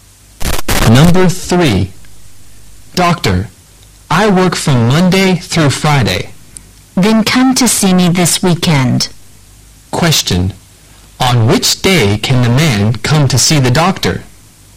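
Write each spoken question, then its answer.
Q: On which day can the man come to see the doctor?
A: At the weekend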